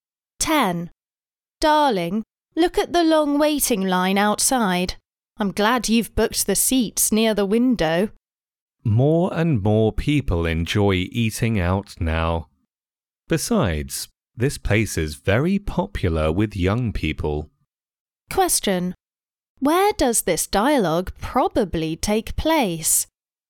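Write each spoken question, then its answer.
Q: Where does this dialogue probably take place?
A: In a restaurant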